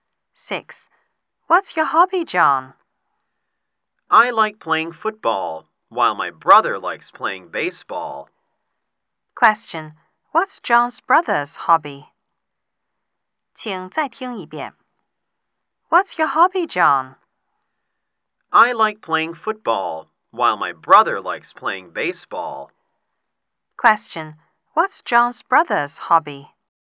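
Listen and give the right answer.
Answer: Playing baseball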